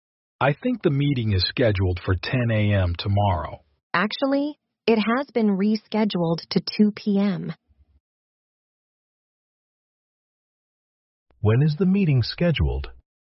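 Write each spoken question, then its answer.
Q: When is the meeting scheduled?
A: 2 p.m. tomorrow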